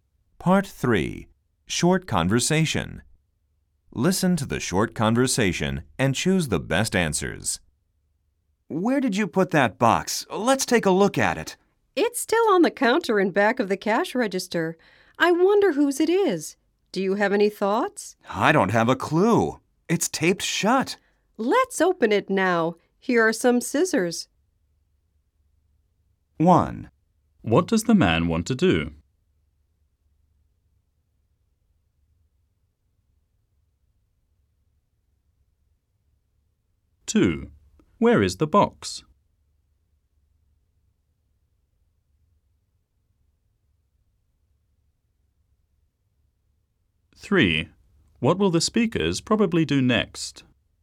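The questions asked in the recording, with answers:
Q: Where is the box?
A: On the counter in back of the cash register

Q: What will the speakers probably do next?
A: Open the box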